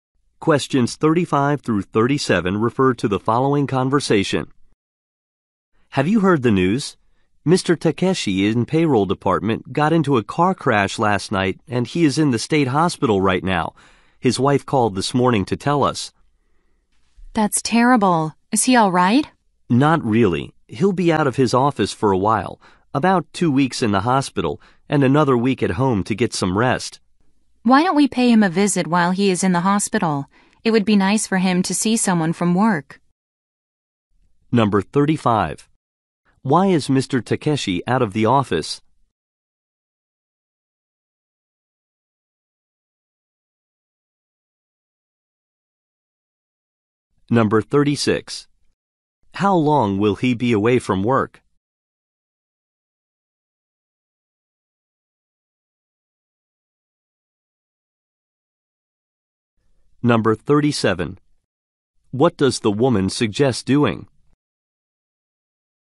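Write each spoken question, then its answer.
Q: Why is Mr. Takeshi out of the office?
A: He was in a car crash and is in the hospital

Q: How long will he be away from work?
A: About three weeks

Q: What does the woman suggest doing?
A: Visiting him in the hospital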